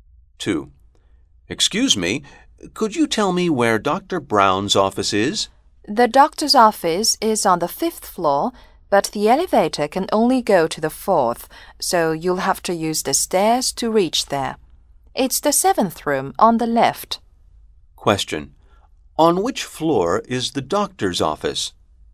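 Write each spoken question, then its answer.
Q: On which floor is the doctor's office?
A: On the 5th floor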